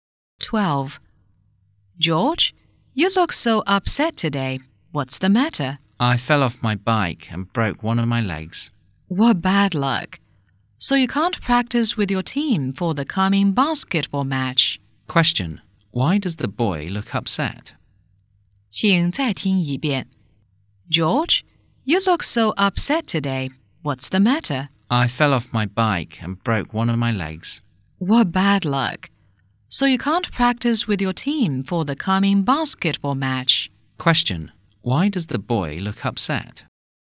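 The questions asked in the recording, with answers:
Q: Question, why does the boy look upset?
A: He fell off his bike and broke his leg.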